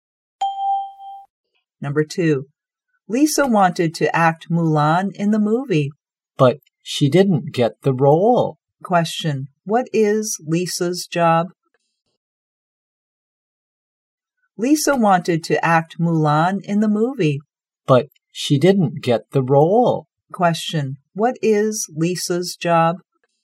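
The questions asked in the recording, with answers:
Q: Question, what is Lisa's job?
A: An actress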